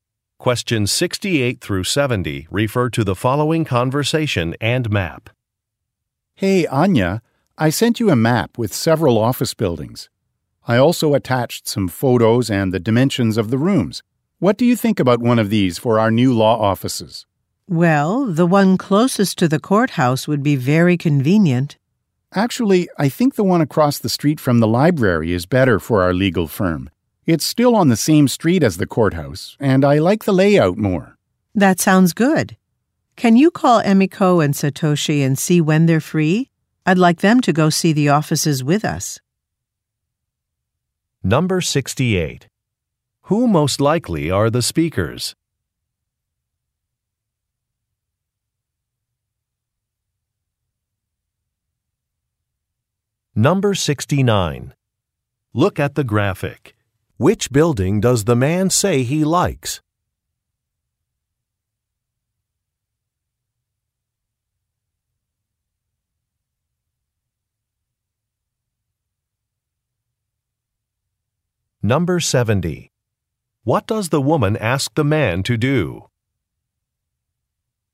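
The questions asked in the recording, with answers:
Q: Who most likely are the speakers?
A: Lawyers

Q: What does the woman ask the man to do?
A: Call Emiko and Satoshi to see when they're free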